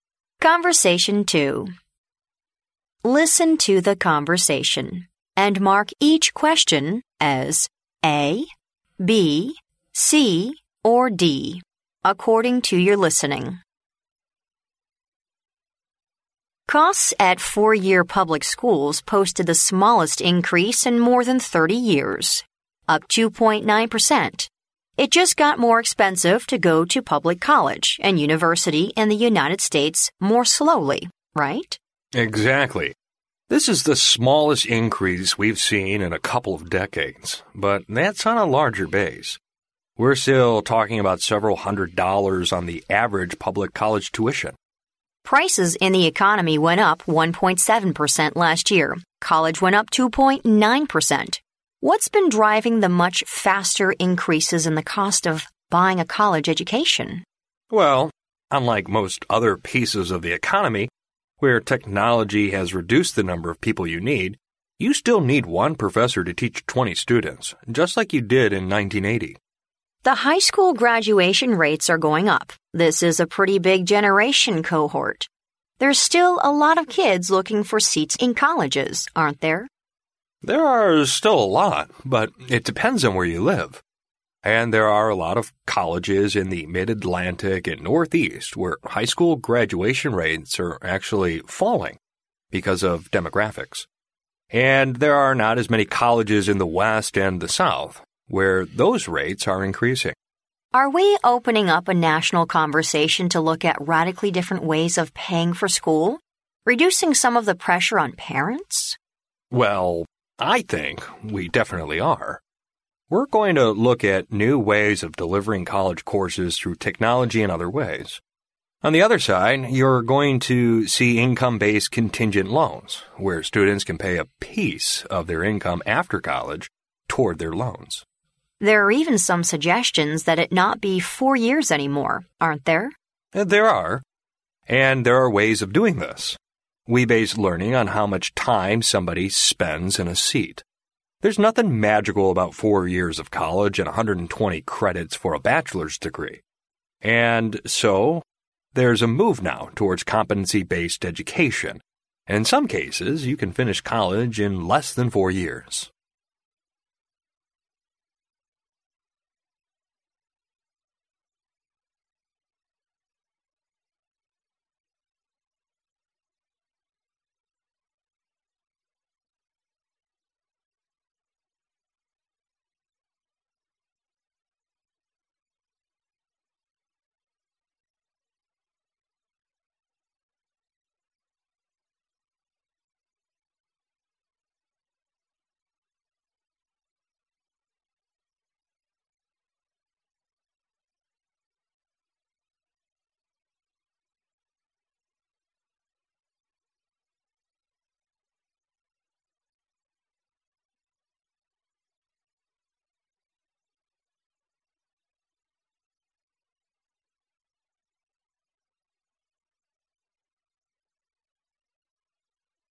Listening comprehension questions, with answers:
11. How much has the public college tuition increased?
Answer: Several hundred dollars.

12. Why does the cost of college education rise faster than the economy as a whole?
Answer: Colleges have to spend more hiring professors to teach.

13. In which area can students most easily find seats in colleges?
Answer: In the Mid-Atlantic.

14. Which is mentioned as a way for colleges to reduce students' financial pressure?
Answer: Offering online courses.

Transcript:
W: Costs at four-year public schools posted the smallest increase in more than 30 years, up 2.9 percent. It just got more expensive to go to public college and university in the United States more slowly, right?
M: Exactly. This is the smallest increase we've seen in a couple of decades, but that's on a larger base. We're still talking about several hundred dollars on the average public college tuition.
W: Prices in the economy went up 1.7 percent last year. College went up 2.9 percent. What's been driving the much faster increases in the cost of buying a college education?
M: Well, unlike most other pieces of the economy, where technology has reduced the number of people you need, you still need one professor to teach 20 students, just like you did in 1980.
W: The high school graduation rates are going up. This is a pretty big generational cohort. There're still a lot of kids looking for seats in colleges, aren't there?
But it depends where you live. And there're a lot of colleges in the Mid-Atlantic and Northeast where high school graduation rates are actually falling because of demographics. And there're not as many colleges in the West and the South, where those rates are increasing.
W: Are we opening up a national conversation to look at radically different ways of paying for school, reducing some of the pressure on parents?
M: Well, I think we definitely are. We're going to look at new ways of delivering college courses through technology and other ways. On the other side, you're going to see income-based contingent loans, where students can pay a piece of their income after college toward their loans.
W: There're even some suggestions that it not be four years anymore, aren't there?
M: There are. And there're ways of doing this. We base learning on how much time somebody spends in a seat. There's nothing magical about four years of college and 120 credits for a bachelor's degree. And so there's a move now towards competency-based education and in some cases, you can finish college in less than four years.